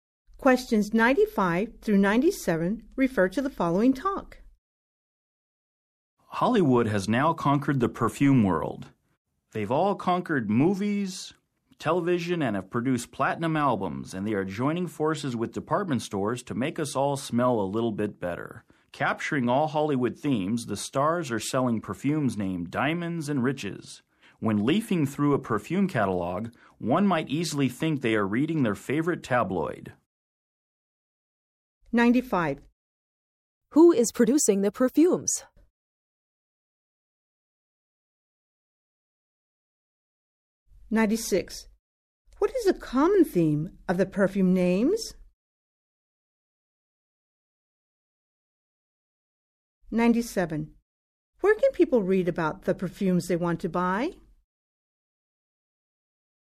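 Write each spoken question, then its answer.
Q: Who is producing the perfumes?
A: Hollywood stars

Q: What is a common theme of the perfume names?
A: Wealth and luxury

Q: Where can people read about the perfumes they want to buy?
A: In a perfume catalog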